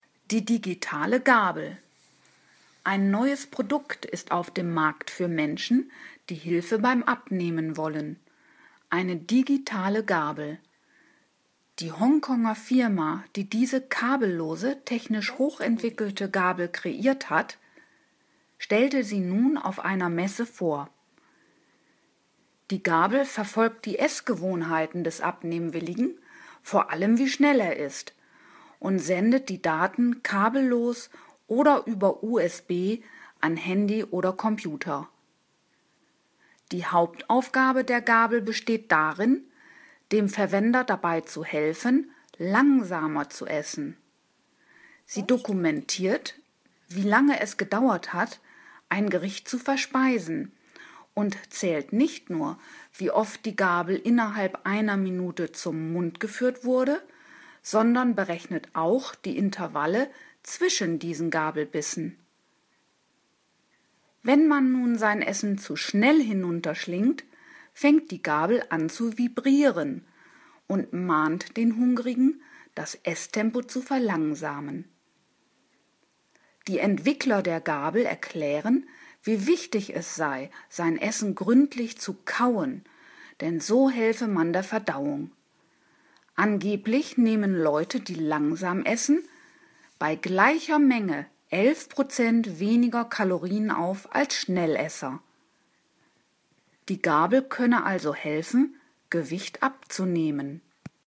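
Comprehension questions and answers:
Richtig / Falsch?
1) Die digitale Gabel ist eine technische Neuheit, die bei der Gewichtsreduktion helfen soll.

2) Die digitale Gabel wurde von einer Firma in Pjöngjang entworfen.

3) Die Gabel sendet Daten über Kabel an Handy oder Computer.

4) Zweck der Gabel ist es, dem Benutzer dabei zu helfen, gemächlicher zu essen.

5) Mit der digitalen Gabel kann man messen, wie oft man innerhalb einer Minute einen Bissen zum Mund geführt hat.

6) Auch der Zeitabstand zwischen den einzelnen Bissen wird von der Gabel erfasst.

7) Wenn man sein Essen zu schnell aufnimmt, fängt die Gabel an zu flirren.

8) Der Essende wird durch das Vibrieren der Gabel darauf hingewiesen, dass er seine Mahlzeit langsamer verspeisen soll.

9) Intensives Kauen und langsames Essen sind nicht gut für die Verdauung.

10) Leute, die langsamer essen, nehmen bei gleicher Menge 11-mal weniger Kalorien auf als Menschen, die schnell essen.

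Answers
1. Richtig
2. Falsch
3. Falsch
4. Richtig
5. Richtig
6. Richtig
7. Falsch
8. Richtig
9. Falsch
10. Falsch

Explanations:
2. Sie wurde von einer Firma in Hongkong entwickelt.
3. Sie sendet Daten kabellos oder über USB an Handy oder Computer.
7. Sie fängt an zu vibrieren.
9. Beides hilft der Verdauung.
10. Sie nehmen bei gleicher Menge 11 Prozent weniger Kalorien auf.

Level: Hörtexte C (schwer)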